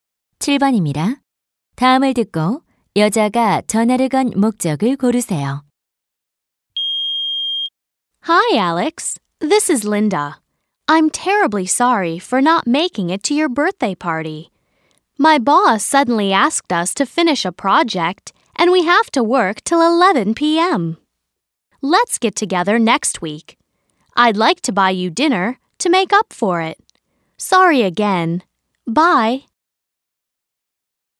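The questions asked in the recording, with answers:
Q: 다음을 듣고 여자가 전화를 건 목적을 고르세요.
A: 생일 파티에 가지 못한 것을 사과하려고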